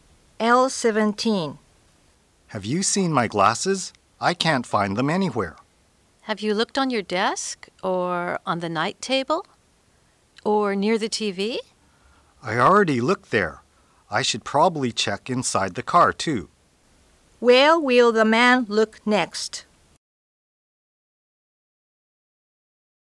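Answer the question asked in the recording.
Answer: Inside the car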